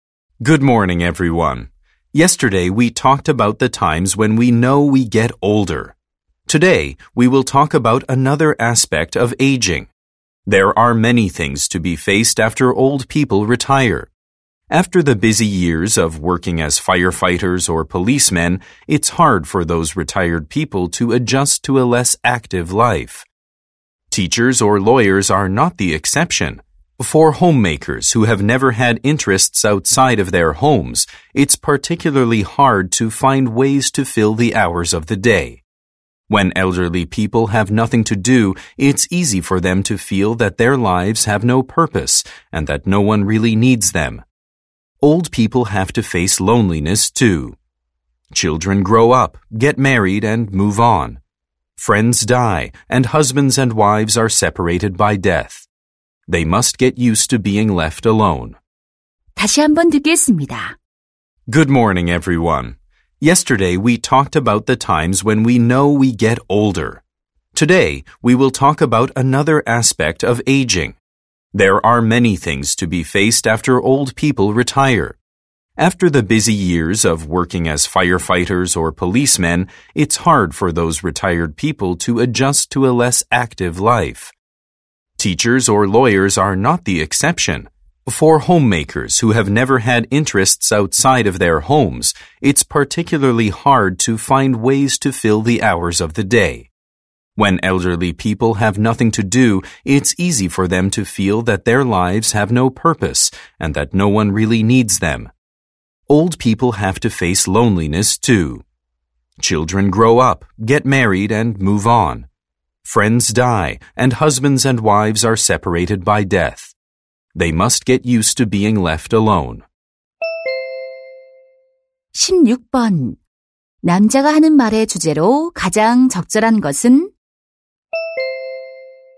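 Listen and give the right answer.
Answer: 노인들이 은퇴 후 겪는 어려움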